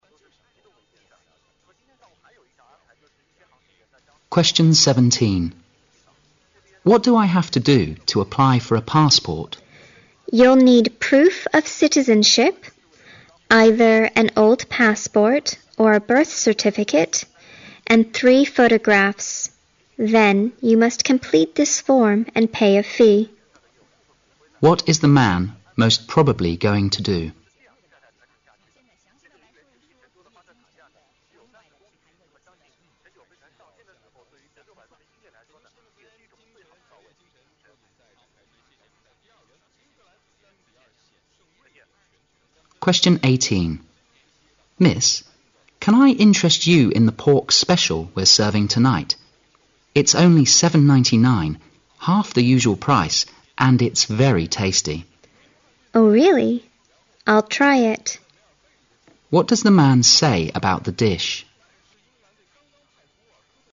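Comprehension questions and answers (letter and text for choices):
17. What is the man most probably going to do?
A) Travel overseas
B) Take a photo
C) Look for a new job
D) Adopt a child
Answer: A) Travel overseas

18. What does the man say about the dish?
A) It is a routine offer.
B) It is quite healthy.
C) It is new serving menu.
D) It is a good bargain.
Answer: D) It is a good bargain.

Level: 大学英语四级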